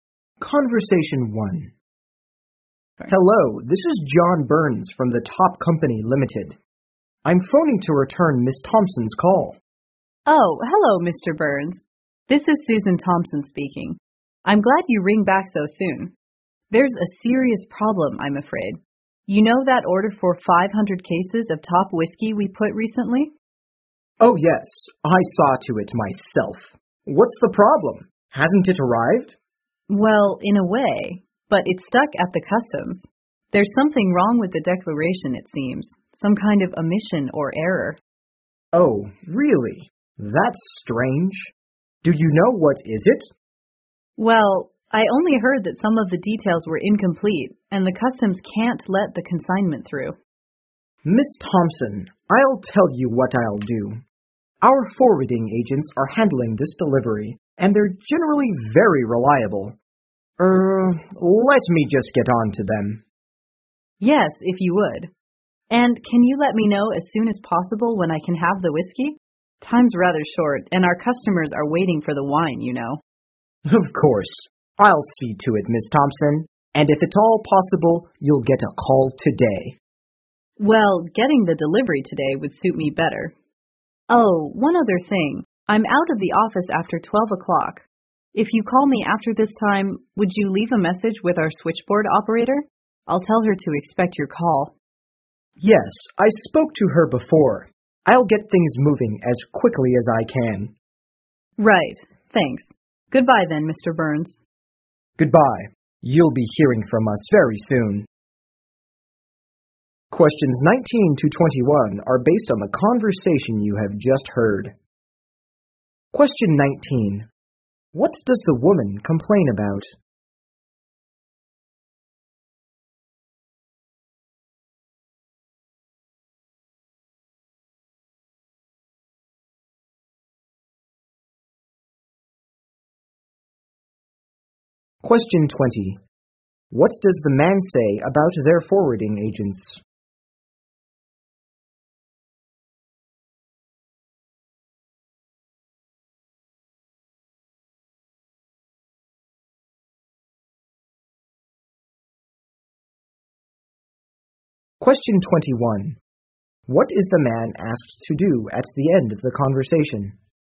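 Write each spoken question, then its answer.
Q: What does the woman complain about?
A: The whiskey order is stuck at customs because of an error in the declaration

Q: What does the man say about their forwarding agents?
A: They are generally very reliable

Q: What is the man asked to do at the end of the conversation?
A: Leave a message with the switchboard operator if he calls after 12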